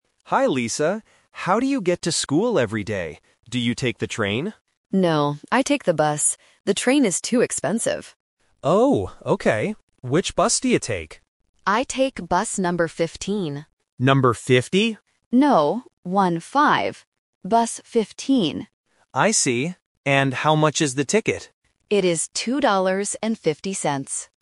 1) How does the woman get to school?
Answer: By bus

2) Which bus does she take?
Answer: Number 15

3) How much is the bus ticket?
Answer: $2.50

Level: A1